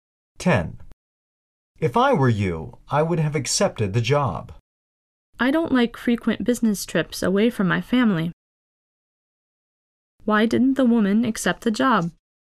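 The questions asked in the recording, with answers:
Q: Why didn't the woman accept the job?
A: She doesn't like frequent business trips away from her family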